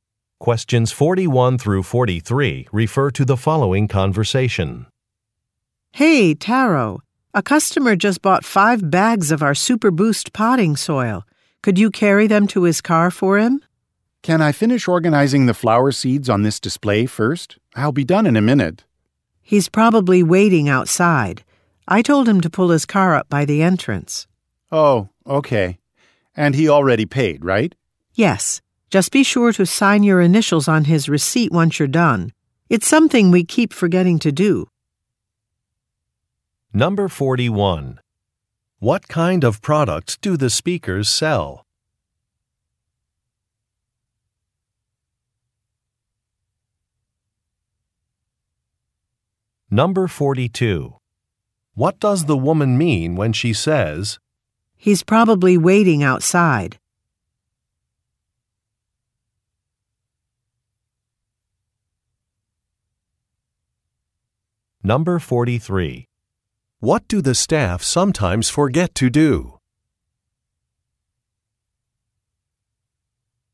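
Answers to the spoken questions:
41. Gardening supplies
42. The man should help the customer right away
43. Sign their initials on the receipt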